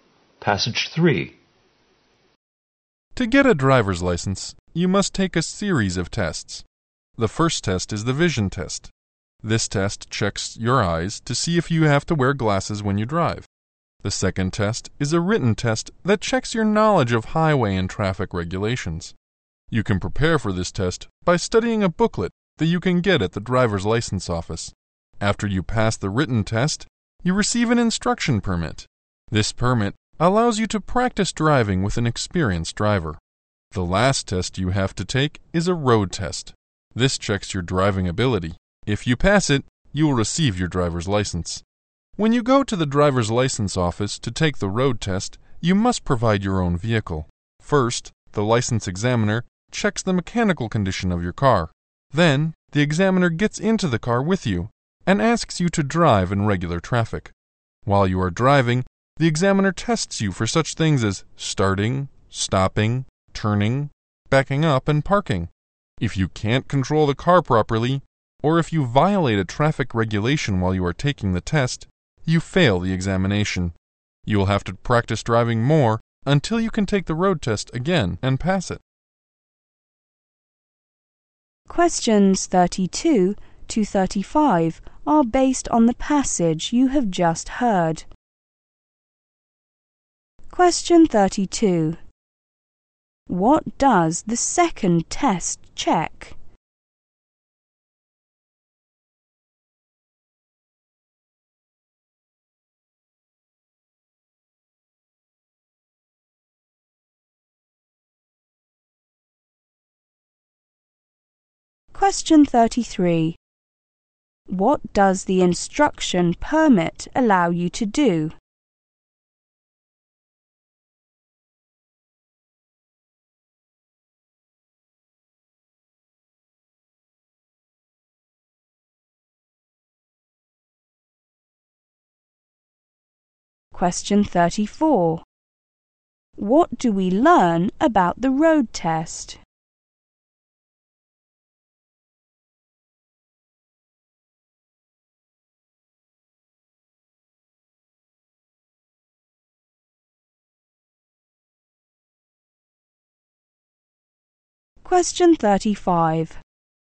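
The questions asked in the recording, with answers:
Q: What does the second test check?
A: Knowledge of highway and traffic regulations

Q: What does the instruction permit allow you to do?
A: Practice driving with an experienced driver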